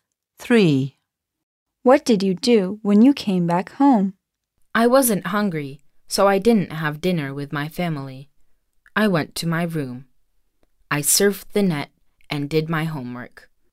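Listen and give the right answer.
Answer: Went to my room, surfed the net and did homework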